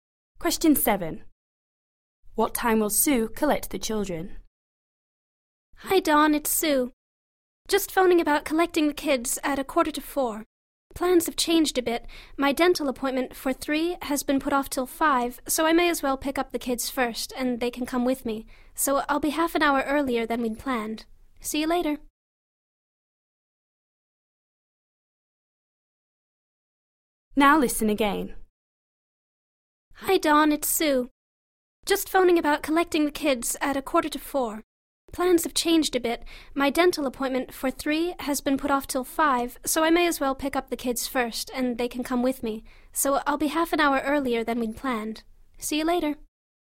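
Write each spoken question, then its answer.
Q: What time will Sue collect the children?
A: 3:15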